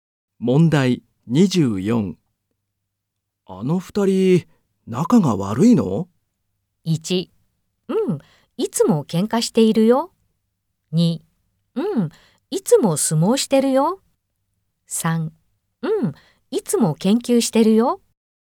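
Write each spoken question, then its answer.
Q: あの二人、仲が悪いの?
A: 1: うん、いつも喧嘩しているよ。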